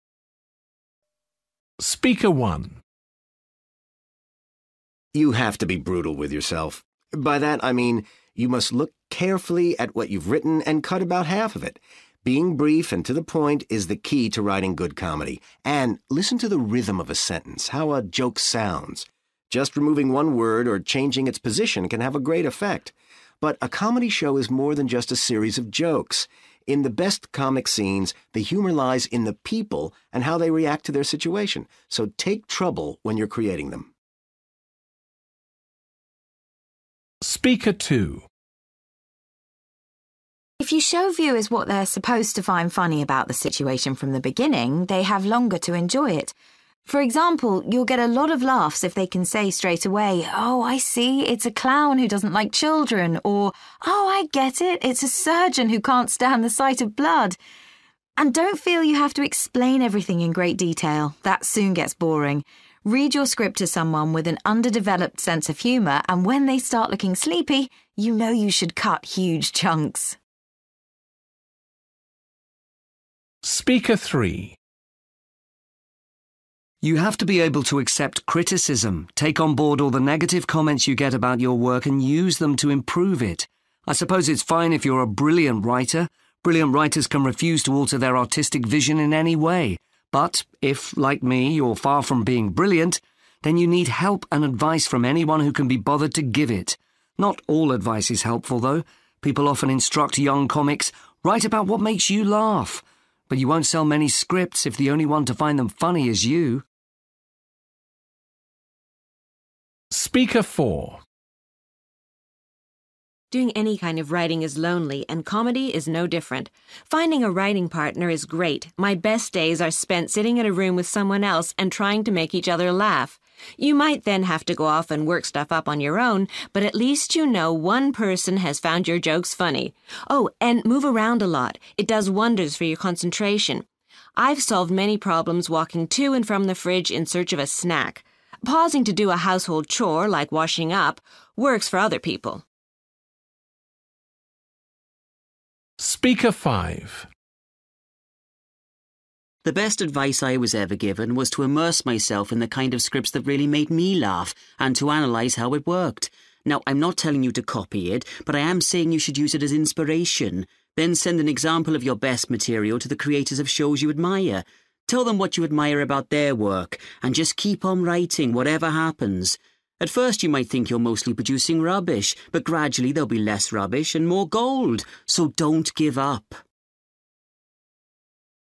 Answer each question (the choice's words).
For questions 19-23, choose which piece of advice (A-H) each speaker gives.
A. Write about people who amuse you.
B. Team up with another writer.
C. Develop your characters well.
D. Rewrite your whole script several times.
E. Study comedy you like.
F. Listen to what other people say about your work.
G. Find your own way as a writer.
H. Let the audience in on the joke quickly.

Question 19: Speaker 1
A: Develop your characters well.

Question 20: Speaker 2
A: Let the audience in on the joke quickly.

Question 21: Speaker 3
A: Listen to what other people say about your work.

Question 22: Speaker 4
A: Team up with another writer.

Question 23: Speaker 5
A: Study comedy you like.

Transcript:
You have to be brutal with yourself. By that, I mean you must look carefully at what you've written and cut about half of it. Being brief and to the point is the key to writing good comedy. And listen to the rhythm of a sentence, how a joke sounds. Just removing one word, or changing its position can have a great effect. But a comedy show is more than just a series of jokes – in the best comic scenes, the humour lies in the people and how they react to their situation. So take trouble when you're creating them.
If you show viewers what they're supposed to find funny about the situation from the beginning, they have longer to enjoy it. For example, you'll get a lot of laughs if they can say straightaway, 'Oh, I see, it's a clown who doesn't like children,' or, 'Oh, I get it, it's a surgeon who can't stand the sight of blood.' And don't feel you have to explain everything in great detail – that soon gets boring. Read your script to someone with an underdeveloped sense of humour and when they start looking sleepy, you know you should cut huge chunks!
You have to be able to accept criticism. Take on board all the negative comments you get about your work and use them to improve it. I suppose it's fine if you're a brilliant writer – brilliant writers can refuse to alter their artistic vision in any way! But if, like me, you're far from being brilliant, then you need help and advice from anyone who can be bothered to give it. Not all advice is helpful, though. People often instruct young comics, 'Write about what makes you laugh,' but you won't sell many scripts if the only one to find them funny is you!
Doing any kind of writing is lonely, and comedy is no different. Finding a writing partner is great – my best days are spent sitting in a room with someone else and trying to make each other laugh. You might then have to go off and work stuff up on your own but at least you know one person has found your jokes funny! Oh, and more around a lot. It does wonders for your concentration. I've solved many problems walking to and from the fridge in search of a snack. Pausing to do a household chore, like washing up, works for other people!
The best advice I was ever given was to immerse myself in the kind of scripts that really made me laugh and to analyse how it worked. Now, I'm not telling you to copy it, but I am saying you should use it as inspiration. Then send an example of your best material to the creators of shows you admire – tell them what you admire about their work. And just keep on writing, whatever happens. At first, you might think you're mostly producing rubbish, but, gradually there will be less rubbish and more gold – so don't give up.

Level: B2